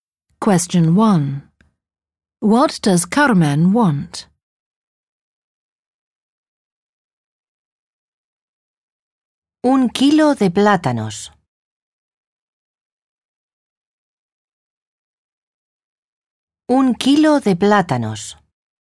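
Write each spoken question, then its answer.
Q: What does Carmen want?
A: A kilo of bananas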